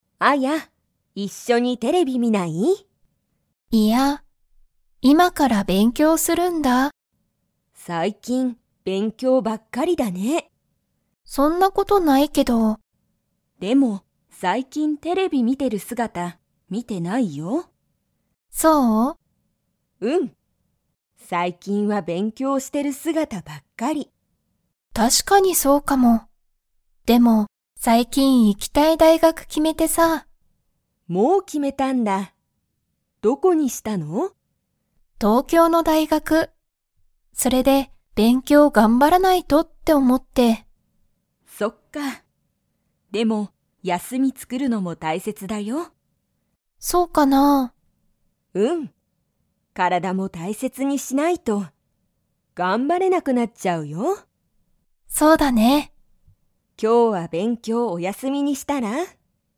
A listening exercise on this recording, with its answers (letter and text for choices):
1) アヤは最近(さいきん)、____ばっかりだ。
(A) テレビ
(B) 勉強べんきょう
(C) 大学(だいがく)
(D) 休(やす)み)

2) アヤは今日(きょう)、勉強(べんきょう)しますか?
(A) はい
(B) いいえ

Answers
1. (B) 勉強べんきょう
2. (B) いいえ

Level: Level 2